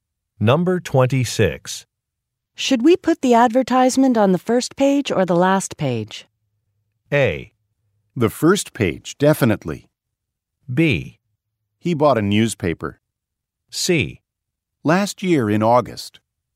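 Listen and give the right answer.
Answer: A: The first page, definitely.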